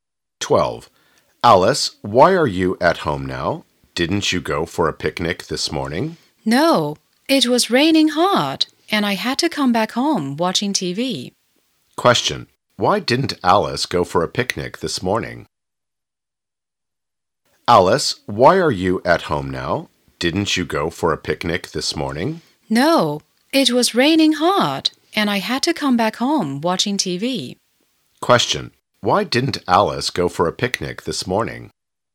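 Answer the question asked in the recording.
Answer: Because it was raining hard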